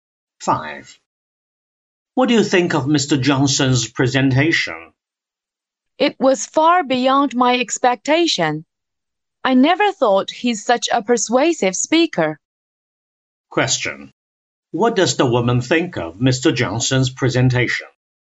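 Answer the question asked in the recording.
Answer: It was much better than she expected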